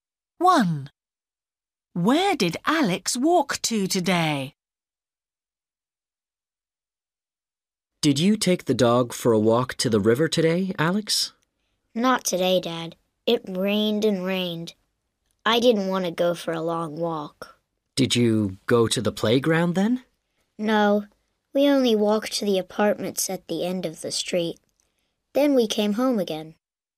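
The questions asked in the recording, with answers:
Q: Where did Alex walk to today?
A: To the apartments at the end of the street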